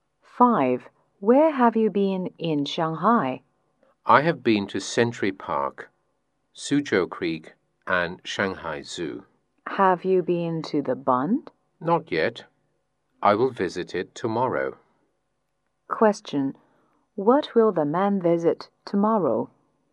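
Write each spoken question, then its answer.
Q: What will the man visit tomorrow?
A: The Bund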